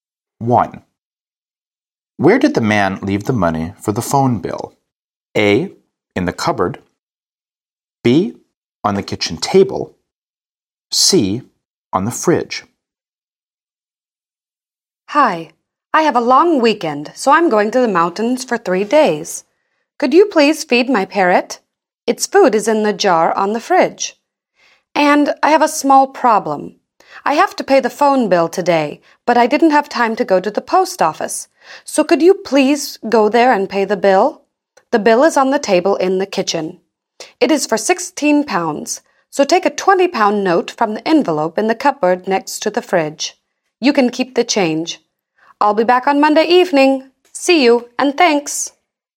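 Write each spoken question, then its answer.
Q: Where did the man leave the money for the phone bill?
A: A: In the cupboard.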